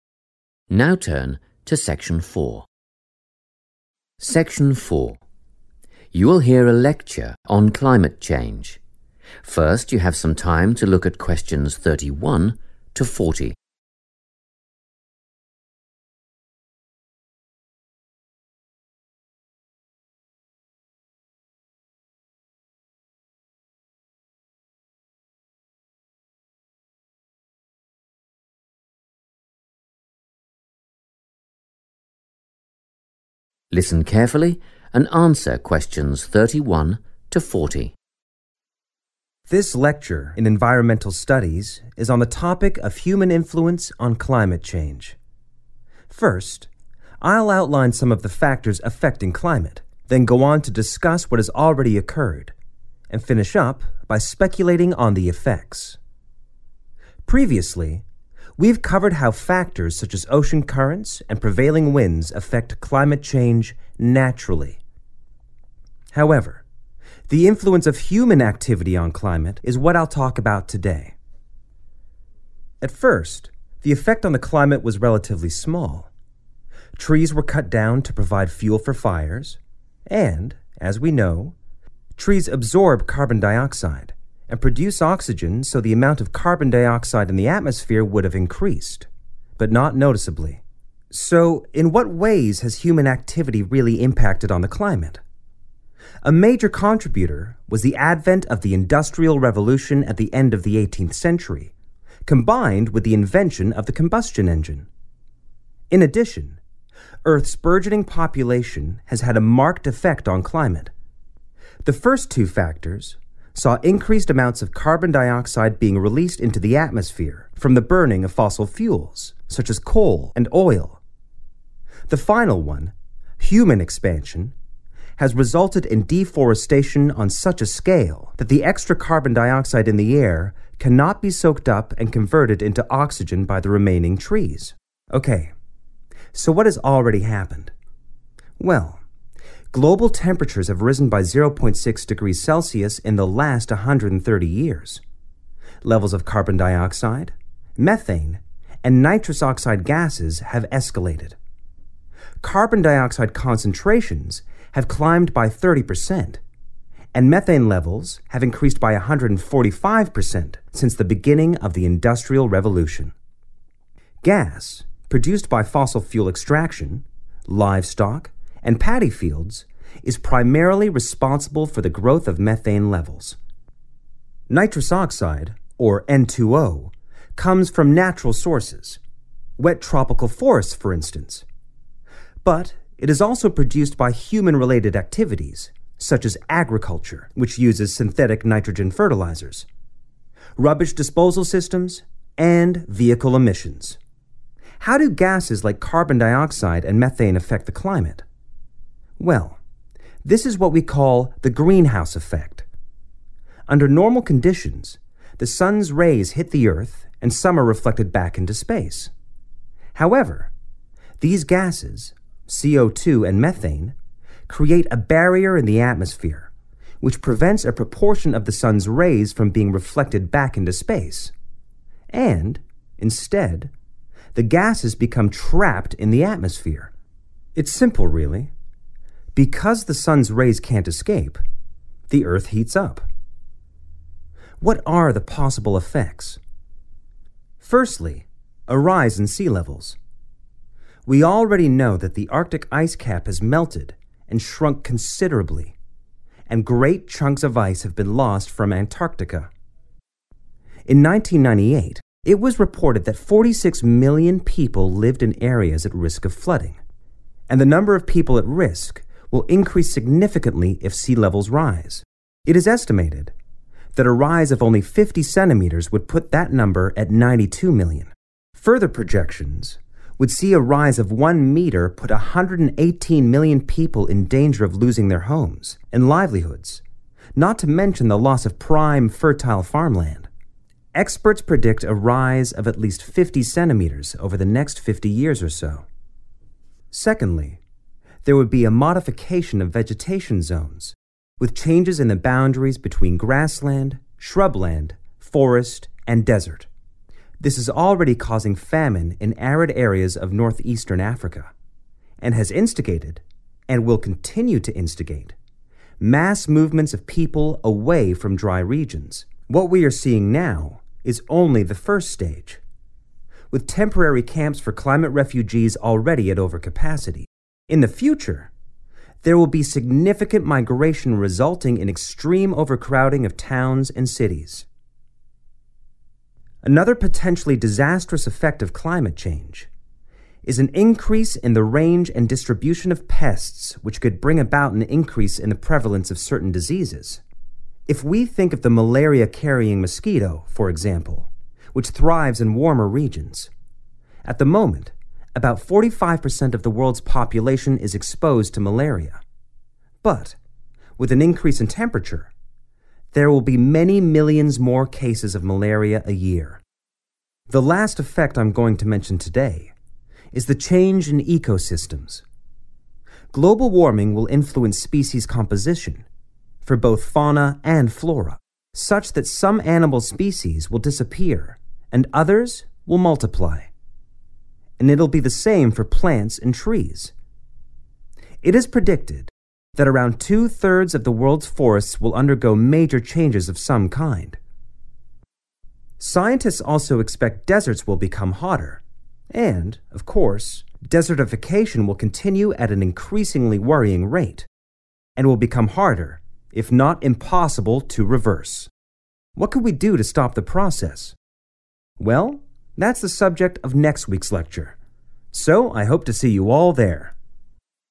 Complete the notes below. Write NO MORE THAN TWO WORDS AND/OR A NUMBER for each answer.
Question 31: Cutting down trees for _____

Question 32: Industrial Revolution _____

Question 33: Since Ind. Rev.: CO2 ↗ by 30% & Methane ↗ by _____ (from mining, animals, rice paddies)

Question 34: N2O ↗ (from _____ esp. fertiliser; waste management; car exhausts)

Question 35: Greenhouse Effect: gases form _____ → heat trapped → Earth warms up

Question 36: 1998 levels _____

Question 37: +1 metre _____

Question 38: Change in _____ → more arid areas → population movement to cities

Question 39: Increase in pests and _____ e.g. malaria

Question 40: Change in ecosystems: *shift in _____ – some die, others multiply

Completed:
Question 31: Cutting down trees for fuel
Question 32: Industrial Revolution combustion engine
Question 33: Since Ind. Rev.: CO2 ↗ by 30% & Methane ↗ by 145% / 145 percent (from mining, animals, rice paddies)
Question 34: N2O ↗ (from agriculture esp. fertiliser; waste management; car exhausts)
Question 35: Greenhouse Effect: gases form a barrier / barrier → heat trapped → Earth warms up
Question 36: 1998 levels 46 million
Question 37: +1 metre 118 million
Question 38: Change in vegetation zones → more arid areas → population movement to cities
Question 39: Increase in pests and certain diseases / diseases / certain disease / disease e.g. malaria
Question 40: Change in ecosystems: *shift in species composition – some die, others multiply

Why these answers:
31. The correct answer is 'fuel' because the speaker mentions that at the beginning, humans cut down trees to have things to burn for fires. The notes ask why trees were cut down, and the lecture explicitly says they were cut for fuel.
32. The correct answer is identified as a major human factor affecting the climate. The lecturer explains that the Industrial Revolution, along with the invention of the "combustion engine," led to more fossil fuels being burned and more carbon dioxide entering the air. These two events are presented together as significant causes in the history of human impact on the environment.
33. The correct answer is derived from the part of the talk where the speaker compares the rise in different gases. The speaker mentions that since the start of the Industrial Revolution, carbon dioxide went up by 30 percent and then clearly states that methane levels have increased by 145 percent. This matches the note asking for the percentage of methane increase.
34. The correct answer is agriculture because the lecturer identifies it as a human-related activity that produces nitrous oxide (N2O). The notes specifically mention fertilizers, and the speaker explains that agriculture is the activity that uses these synthetic nitrogen fertilizers.
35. The correct answer is 'barrier' because the lecturer uses this word to describe how greenhouse gases (like carbon dioxide and methane) behave in the atmosphere. These gases form a layer that acts like a block, preventing the sun's heat from escaping back into space. This direct connection explains why the heat remains trapped and causes the Earth to warm up, fitting the sequence described in the notes.
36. The correct answer is based on the data provided for sea-level risks. The lecturer states that in 1998, 46 million people were at risk of flooding. This figure corresponds directly to the '1998 levels' category in the notes' table.
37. The correct answer is 118 million because the lecturer explains that scientists have calculated how many people will be in danger based on different sea-level rises. Specifically, the transcript notes that a one-metre increase would affect 118 million people.
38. The correct answer is "vegetation zones" because the lecturer lists this as a major future effect of climate change. He explains that these areas will be modified, leading to shifts between types of land like grassland and desert. This link explains the creation of "more arid areas" (dry regions) and the "population movement" (mass movements of people) mentioned in the lecture notes.
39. The correct answer is based on the lecture's section about the dangerous effects of climate change. The speaker explains that as temperatures go up, pests (like insects) will move to more areas, which leads to a higher occurrence of 'certain diseases,' such as malaria.
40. The correct answer is 'species composition' because the lecture states that global warming will 'influence' (meaning a 'shift' or change) the variety of living things. It explains that this means certain types of animals and plants will 'disappear' (another way to say they 'die' out), while other types will 'multiply' (meaning their numbers will increase).

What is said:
Section 4
You will hear a lecture on climate change. First you have some time to look at questions 31 to 40.
Listen carefully and answer questions 31 to 40.
This lecture in Environmental Studies is on the topic of human influence on climate change. First, I'll outline some of the factors affecting climate, then go on to discuss what has already occurred, and finish up by speculating on the effects.
Previously, we've covered how factors such as ocean currents and prevailing winds affect climate change naturally. However, the influence of human activity on climate is what I'll talk about today. At first, the effect on the climate was relatively small; trees were cut down to provide fuel for fires, and, as we know, trees absorb carbon dioxide and produce oxygen so the amount of carbon dioxide in the atmosphere would have increased – but not noticeably.
So, in what ways has human activity really impacted on the climate? A major contributor was the advent of the Industrial Revolution at the end of the 18th century, combined with the invention of the combustion engine. In addition, Earth's burgeoning population has had a marked effect on climate. The first two factors saw increased amounts of carbon dioxide being released into the atmosphere from the burning of fossil fuels, such as coal and oil. The final one, human expansion, has resulted in deforestation on such a scale that the extra carbon dioxide in the air cannot be soaked up and converted into oxygen by the remaining trees.
Okay – so what has already happened? Well, global temperatures have risen by 0.6 degrees Celsius in the last 130 years. Levels of carbon dioxide, methane and nitrous oxide gases have escalated. Carbon dioxide concentrations have climbed by 30% and methane levels have increased by 145% since the beginning of the Industrial Revolution. Gas produced by fossil fuel extraction, livestock and paddy fields is primarily responsible for the growth of methane levels. Nitrous oxide, or N2O, comes from natural sources – wet tropical forests, for instance – but it is also produced by human-related activities such as agriculture, which uses synthetic nitrogen fertilisers, rubbish disposal systems and vehicle emissions.
How do gases like carbon dioxide and methane affect the climate? Well, this is what we call the Greenhouse Effect. Under normal conditions, the sun's rays hit the earth and some are reflected back into space. However, these gases (CO2 and methane) create a barrier in the atmosphere which prevents a proportion of the sun's rays from being reflected back into space – and, instead, the gases become trapped in the atmosphere. It's simple really – because the sun's rays can't escape, the Earth heats up.
What are the possible effects? Firstly, a rise in sea levels: we already know that the Arctic ice cap has melted and shrunk considerably and great chunks of ice have been lost from Antarctica. In 1998, it was reported that 46 million people lived in areas at risk of flooding ... and the number of people at risk will increase significantly if sea levels rise. It is estimated that a rise of only 50 centimetres would put that number at 92 million. Further projections would see a rise of one metre put 118 million people in danger of losing their homes and livelihoods – not to mention the loss of prime, fertile farmland. Experts predict a rise of at least 50 centimetres over the next 50 years or so.
Secondly, there would be a modification of vegetation zones with changes in the boundaries between grassland, shrub land, forest and desert. This is already causing famine in arid areas of north-eastern Africa, and has instigated – and will continue to instigate – mass movements of people away from dry regions. What we are seeing now is only the first stage, with temporary camps for climate refugees already at overcapacity; in the future, there will be significant migration resulting in extreme overcrowding of towns and cities.
Another potentially disastrous effect of climate change is an increase in the range and distribution of pests which could bring about an increase in the prevalence of certain diseases. If we think of the malaria-carrying mosquito, for example, which thrives in warmer regions – at the moment, about 45% of the world's population is exposed to malaria – but with an increase in temperature, there will be many millions more cases of malaria a year.
The last effect I'm going to mention today is the change in ecosystems. Global warming will influence species composition – for both fauna and flora – such that some animal species will disappear and others will multiply; and it'll be the same for plants and trees. It is predicted that around two-thirds of the world's forests will undergo major changes of some kind. Scientists also expect deserts will become hotter and, of course, desertification will continue at an increasingly worrying rate and will become harder, if not impossible, to reverse.
What can we do to stop the process? Well, that's the subject of next week's lecture – so I hope to see you all there.
That is the end of section 4. You now have half a minute to check your answers.